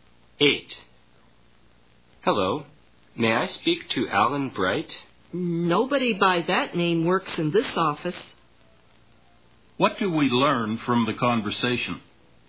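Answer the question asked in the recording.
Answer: Alan Bright doesn't work in that office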